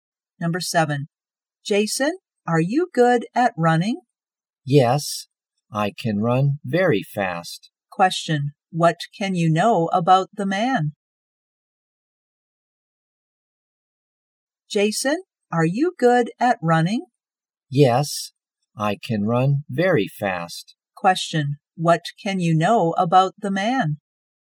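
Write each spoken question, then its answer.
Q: what can you know about the man?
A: he is good at running / runs very fast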